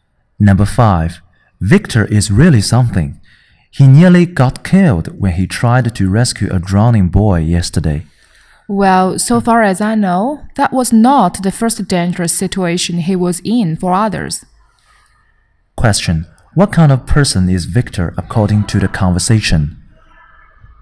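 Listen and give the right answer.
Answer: Brave and willing to risk himself to help others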